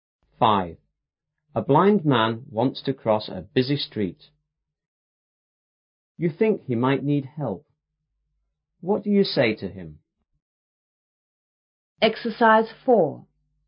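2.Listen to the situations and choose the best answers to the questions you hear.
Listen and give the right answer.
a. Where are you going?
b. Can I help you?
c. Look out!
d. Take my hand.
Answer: b. Can I help you?

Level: 初中英语广州版5B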